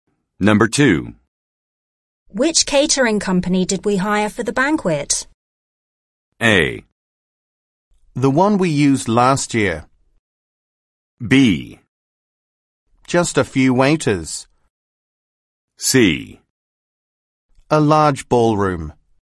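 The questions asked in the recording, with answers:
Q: Which catering company did we hire for the banquet?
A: A: The one we used last year.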